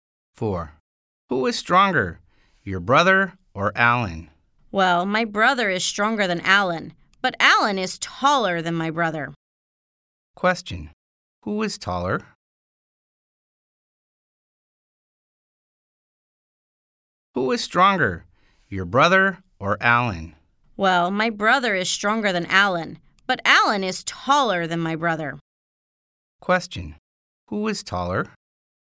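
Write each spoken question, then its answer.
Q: Who is taller?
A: Alan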